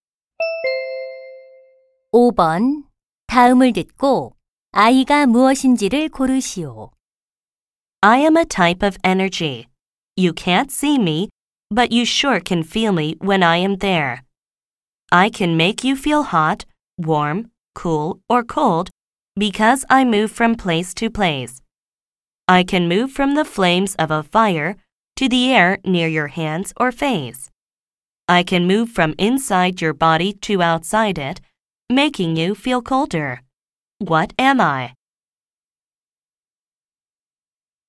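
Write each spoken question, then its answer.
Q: 다음을 듣고 아이가 무엇인지를 고르시오.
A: 열 (heat)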